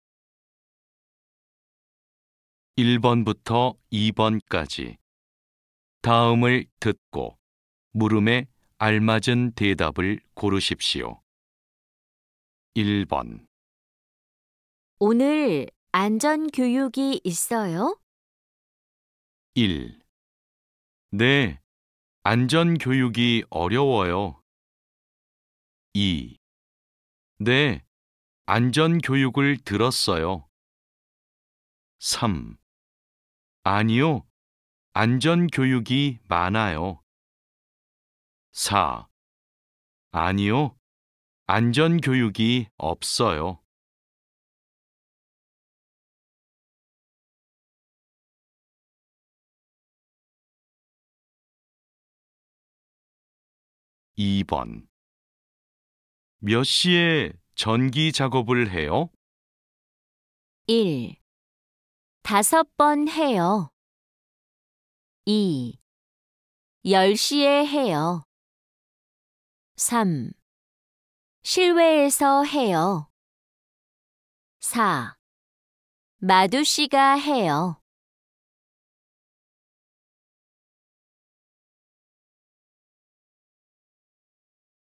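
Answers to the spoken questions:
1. 4: 아니요, 안전 교육이 없어요.
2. 2: 10시에 해요.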